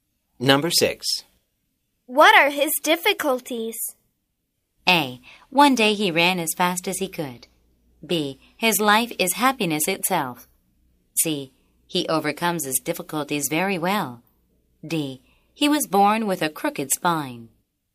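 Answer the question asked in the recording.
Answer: D: He was born with a crooked spine.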